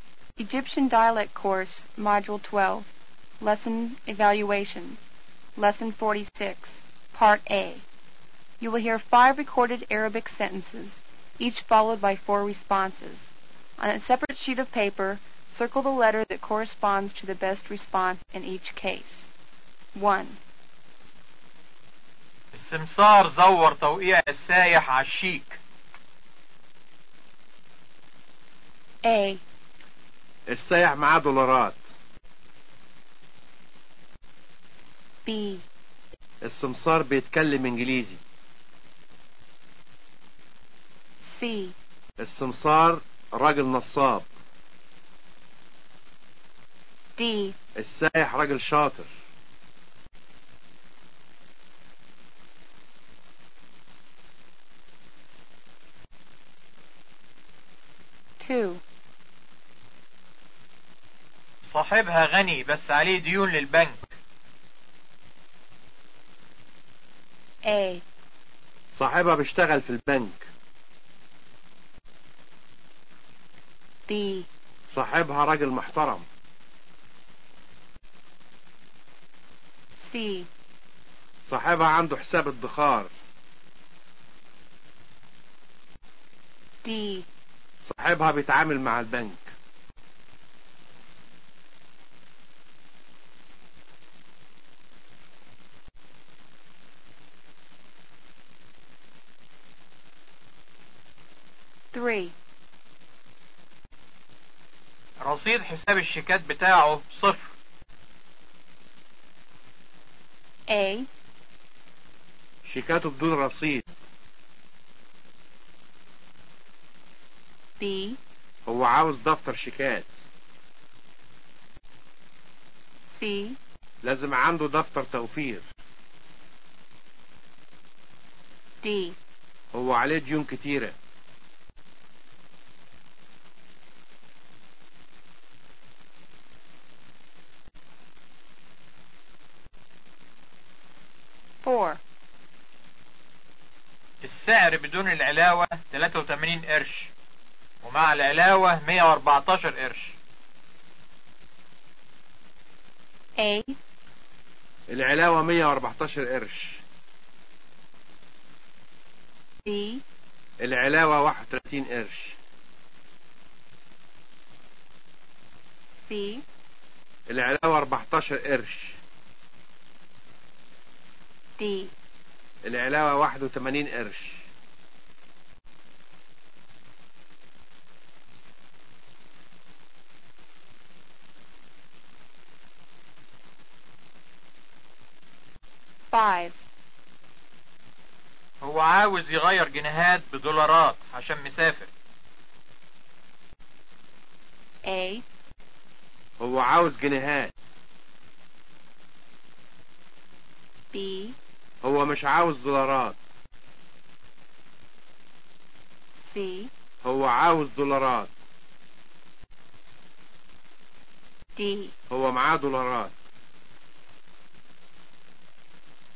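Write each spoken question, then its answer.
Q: السمسار زور توقيع السائح على الشيك.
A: C: السمسار راجل نصاب.

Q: رصيد حساب الشيكات بتاعه صفر.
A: A: شيكاته بدون رصيد.

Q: السعر بدون العلاوة 83 قرش، ومع العلاوة 114 قرش.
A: B: العلاوة 31 قرش.

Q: هو عاوز يغير جنيهات بدولارات عشان مسافر.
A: C: هو عاوز دولارات.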